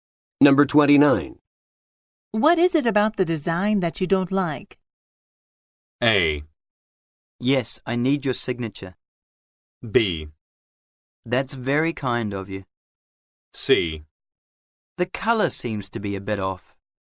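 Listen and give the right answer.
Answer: C: The color seems to be a bit off.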